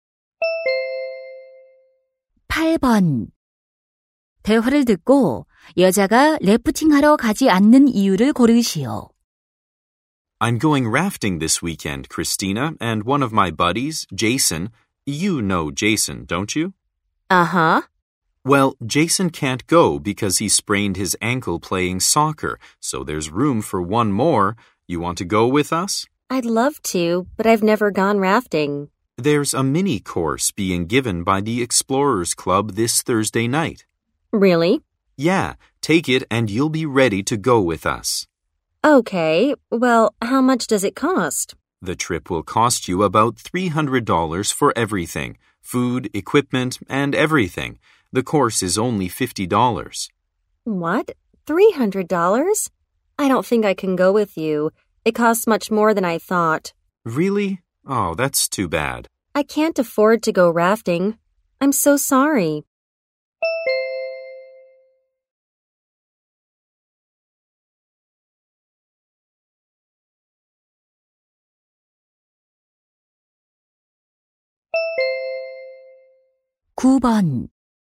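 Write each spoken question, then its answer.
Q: 대화를 듣고 여자가 래프팅하러 가지 않는 이유를 고르시오.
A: 비용이 너무 많이 들어서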